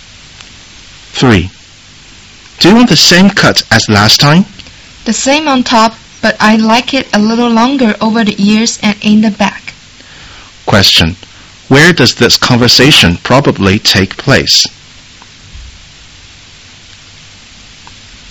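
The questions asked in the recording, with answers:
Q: Where does this conversation probably take place?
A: At a barber's / hair salon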